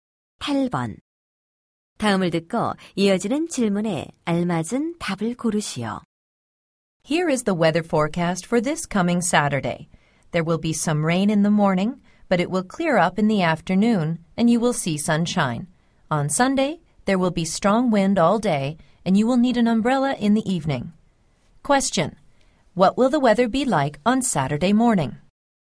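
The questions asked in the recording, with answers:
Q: Question: What will the weather be like on Saturday morning?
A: It will be rainy.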